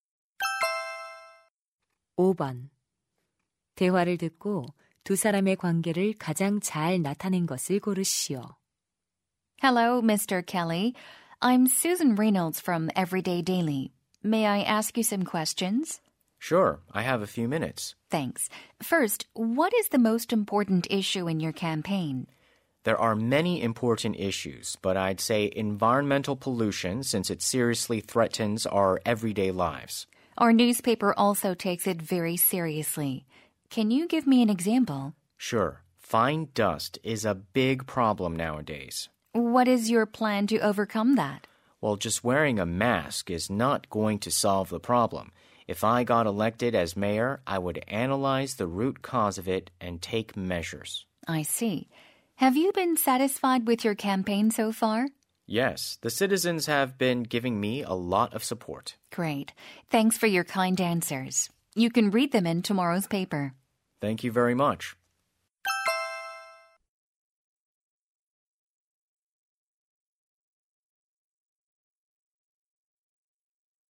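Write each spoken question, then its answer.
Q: 대화를 듣고 두 사람의 관계를 가장 잘 나타낸 것을 고르시오.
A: 신문 기자 - 시장 후보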